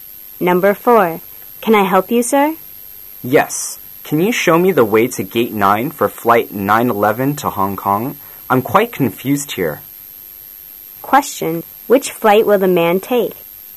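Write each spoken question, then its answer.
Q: which flight will the man take?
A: Flight 911 to Hong Kong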